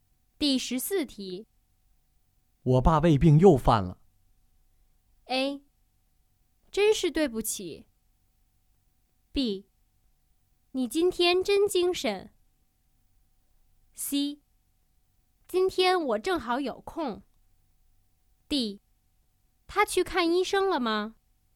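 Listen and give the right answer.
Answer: D: 他去看医生了吗?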